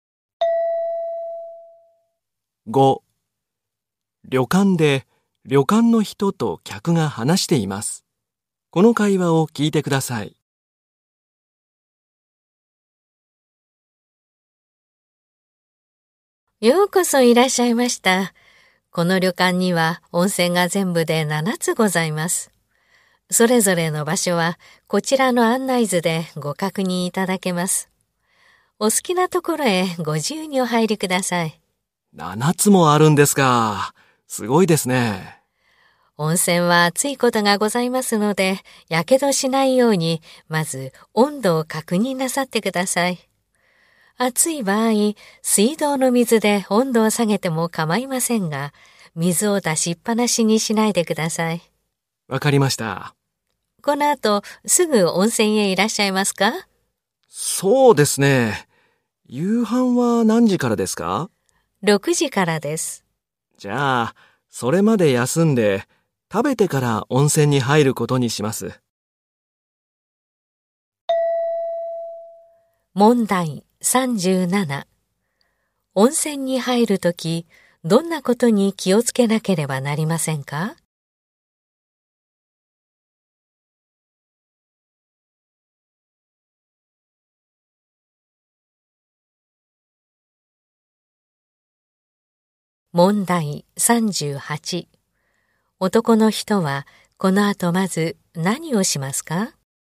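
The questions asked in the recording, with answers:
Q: 男の人はこの後まず何をしますか?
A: 休む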